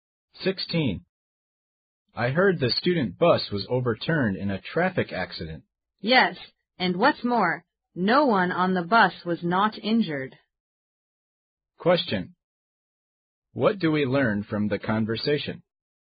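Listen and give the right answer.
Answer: Everyone on the bus was injured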